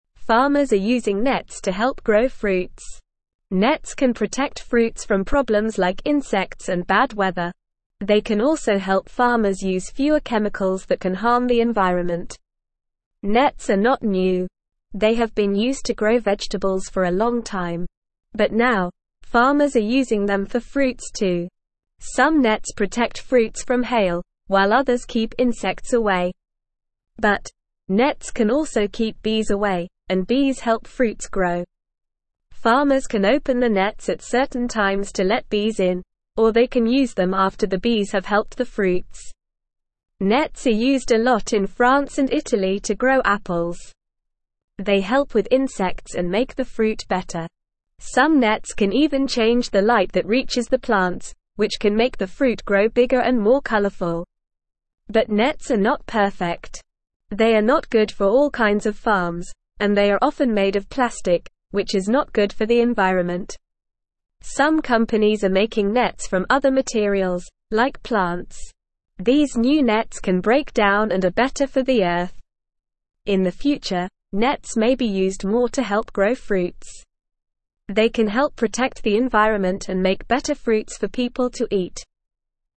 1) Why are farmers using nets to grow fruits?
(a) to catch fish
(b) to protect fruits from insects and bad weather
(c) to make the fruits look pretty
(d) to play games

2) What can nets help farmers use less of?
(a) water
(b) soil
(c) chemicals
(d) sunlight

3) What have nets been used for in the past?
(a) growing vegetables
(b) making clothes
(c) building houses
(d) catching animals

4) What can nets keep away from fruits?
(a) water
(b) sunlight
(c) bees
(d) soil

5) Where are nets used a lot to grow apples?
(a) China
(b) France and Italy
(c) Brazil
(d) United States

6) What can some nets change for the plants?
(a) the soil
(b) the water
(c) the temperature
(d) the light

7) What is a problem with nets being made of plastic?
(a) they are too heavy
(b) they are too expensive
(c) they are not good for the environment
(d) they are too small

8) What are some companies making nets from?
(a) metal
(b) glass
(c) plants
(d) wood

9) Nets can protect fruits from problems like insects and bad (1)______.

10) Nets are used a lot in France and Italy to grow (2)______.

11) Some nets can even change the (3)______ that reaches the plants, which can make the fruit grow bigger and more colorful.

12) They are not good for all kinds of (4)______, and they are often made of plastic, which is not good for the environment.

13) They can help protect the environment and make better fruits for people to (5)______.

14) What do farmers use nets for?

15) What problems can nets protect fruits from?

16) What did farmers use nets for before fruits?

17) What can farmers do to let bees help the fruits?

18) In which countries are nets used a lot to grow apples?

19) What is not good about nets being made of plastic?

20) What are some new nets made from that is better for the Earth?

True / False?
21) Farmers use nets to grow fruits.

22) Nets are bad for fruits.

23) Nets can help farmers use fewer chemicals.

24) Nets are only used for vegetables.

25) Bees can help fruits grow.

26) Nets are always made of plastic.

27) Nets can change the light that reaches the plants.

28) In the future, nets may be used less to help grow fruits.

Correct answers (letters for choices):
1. b
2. c
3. a
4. c
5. b
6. d
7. c
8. c
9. weather
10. apples
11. light
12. farms
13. eat
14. Farmers use nets to help grow fruits and protect them from problems.
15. Nets can protect fruits from insects and bad weather.
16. Farmers used nets for growing vegetables before using them for fruits.
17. Farmers can open the nets at certain times or use them after bees help the fruits.
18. Nets are used a lot in France and Italy to grow apples.
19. Plastic nets are not good for the environment because they do not break down.
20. Some new nets are made from plants, which are better for the Earth because they can break down.
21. True
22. False
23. True
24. False
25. True
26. False
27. True
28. False

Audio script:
Farmers are using nets to help grow fruits. Nets can protect fruits from problems like insects and bad weather. They can also help farmers use fewer chemicals that can harm the environment.
Nets are not new. They have been used to grow vegetables for a long time. But now, farmers are using them for fruits too. Some nets protect fruits from hail, while others keep insects away. But, nets can also keep bees away, and bees help fruits grow. Farmers can open the nets at certain times to let bees in, or they can use them after the bees have helped the fruits.
Nets are used a lot in France and Italy to grow apples. They help with insects and make the fruit better. Some nets can even change the light that reaches the plants, which can make the fruit grow bigger and more colorful.
But nets are not perfect. They are not good for all kinds of farms, and they are often made of plastic, which is not good for the environment. Some companies are making nets from other materials, like plants. These new nets can break down and are better for the Earth.
In the future, nets may be used more to help grow fruits. They can help protect the environment and make better fruits for people to eat.

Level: Level 1